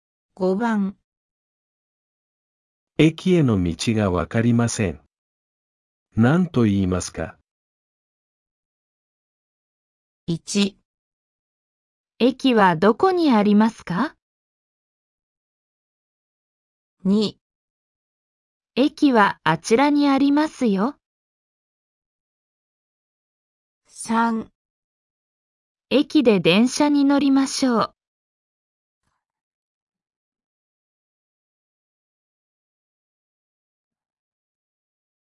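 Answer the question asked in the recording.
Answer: 1

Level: N5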